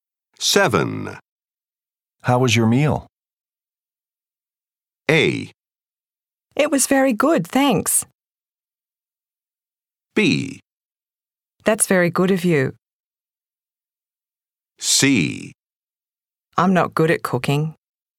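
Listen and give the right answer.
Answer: A: It was very good, thanks.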